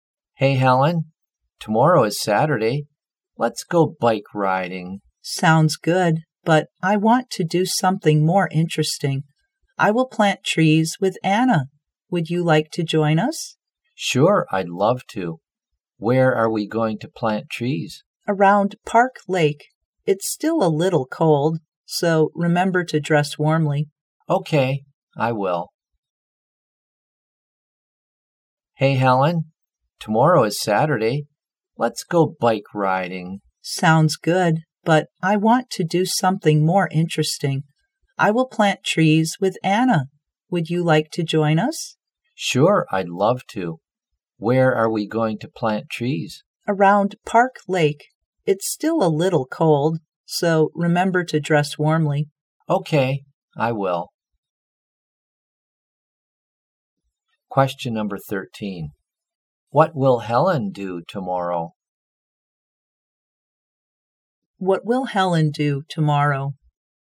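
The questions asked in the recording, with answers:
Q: What will Helen do tomorrow?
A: Plant trees (around Park Lake)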